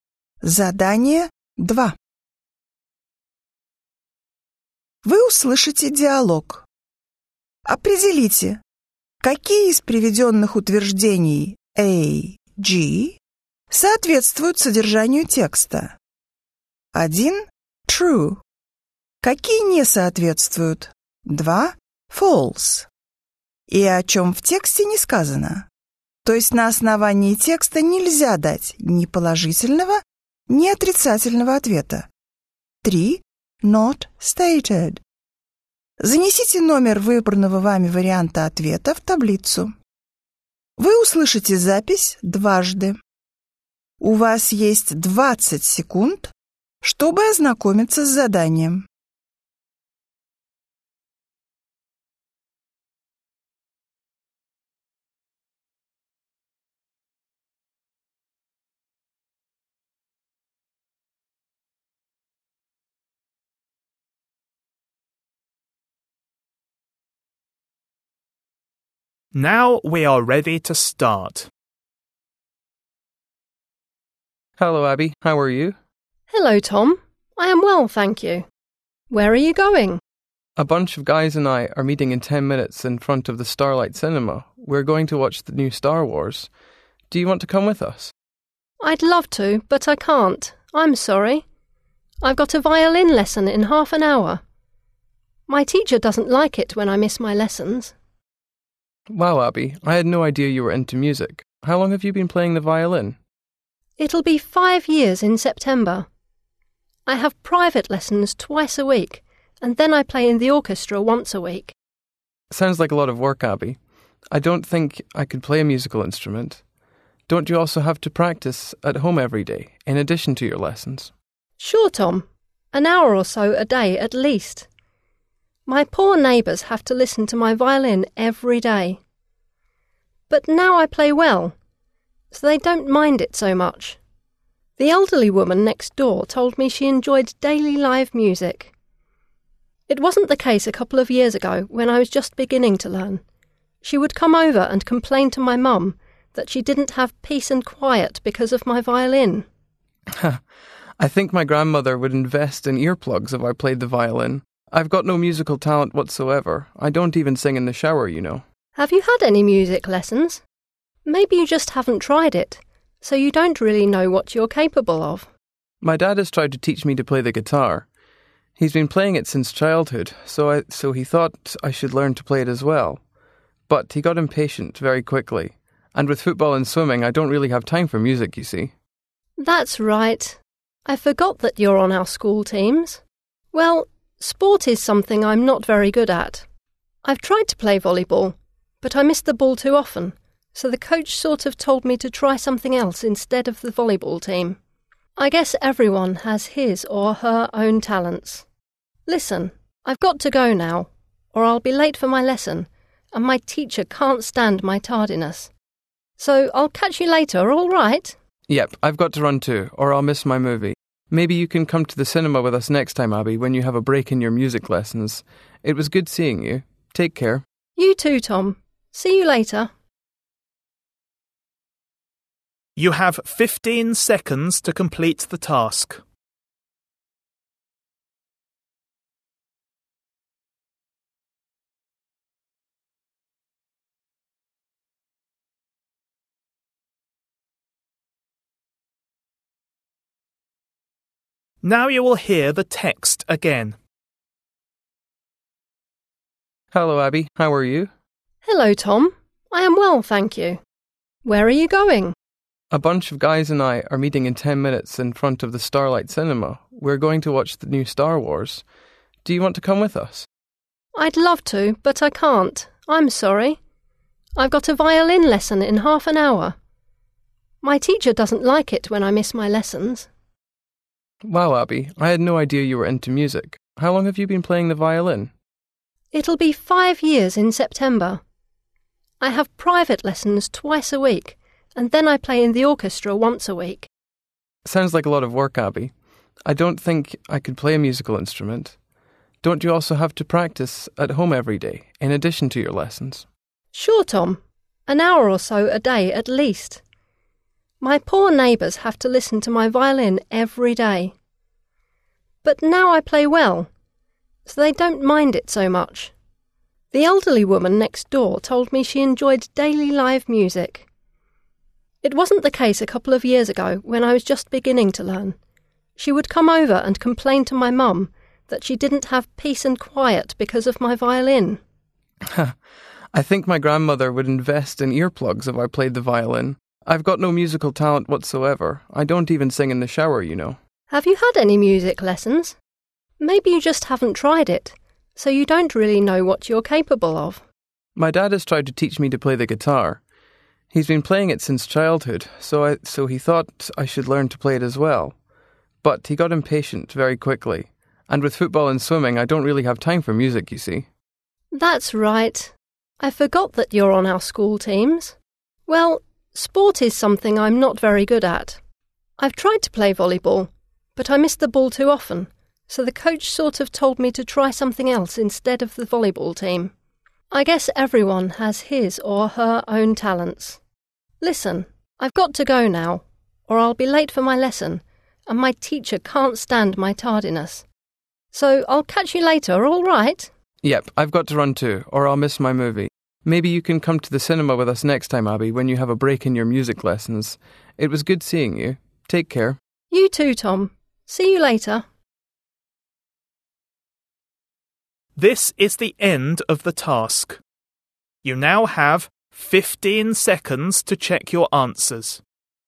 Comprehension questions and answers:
Вы услышите диалог. Определите, какие из приведённых утверждений А-G соответствуют содержанию текста (1 - True), какие не соответствуют (2 - False) и о чём в тексте не сказано, то есть на основании текста нельзя дать ни положительного, ни отрицательного ответа (3 - Not stated). Запишите ответ последовательностью из 7 цифр.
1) Tom is going to see a film with some friends.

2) Abbie accepts Tom's invitation.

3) Abbie often plays her instrument.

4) Abbie's elderly neighbour lives alone.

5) Tom has never tried playing a musical instrument.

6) Abbie plays on her school volleyball team.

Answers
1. True
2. False
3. True
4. Not stated
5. False
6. False

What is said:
Abbie: Hello, Tom. I am well, thank you. Where are you going?
Tom: A bunch of guys and I are meeting in ten minutes in front of the Starlight Cinema. We're going to watch the new Star Wars. Do you want to come with us?
Abbie: I'd love to, but I can't. I'm sorry. I've got a violin lesson in half an hour. My teacher doesn't like it when I miss my lessons.
I had no idea you were into music. How long have you been playing the violin?
Abbie: It'll be five years in September. I have private lessons twice a week, and then I play in the orchestra once a week.
Tom: Sounds like a lot of work, Abbie. I don't think I could play a musical instrument. Don't you also have to practice at home every day, in addition to your lessons?
Abbie: Sure, Tom. An hour or so a day at least. My poor neighbours have to listen to my violin every day. But now I play well, so they don't mind it so much. The elderly woman next door told me she enjoyed daily live music. It wasn't the case a couple of years ago when I was just beginning to learn. She would come over and complain to my mum that she didn't have peace and quiet because of my violin.
Tom: I think my grandmother would invest in earplugs if I played the violin. I've got no musical talent whatsoever. I don't even sing in the shower, you know.
Abbie: Have you had any music lessons? Maybe you just haven't tried it, so you don't really know what you're capable of.
Tom: My dad has tried to teach me to play the guitar. He's been playing it since childhood, so he thought I should learn to play it as well. But he got impatient very quickly, and with football and swimming, I don't really have time for music, you see.
Abbie: That's right. I forgot that you're on our school teams. Well, sport is something I'm not very good at. I've tried to play volleyball, but I miss the ball too often, so the coach sort of told me to try something else instead of the volleyball team. I guess everyone has his or her own talents. Listen, I've got to go now or I'll be late for my lesson and my teacher can't stand my tardiness. So I'll catch you later, alright?
Tom: Yep, I've got to run too or I'll miss my movie. Maybe you can come to the cinema with us next time, Abbie, when you have a break in your music lessons. It was good seeing you. Take care.
Abbie: You too, Tom. See you later.
Утверждение A (Tom is going to see a film with some friends.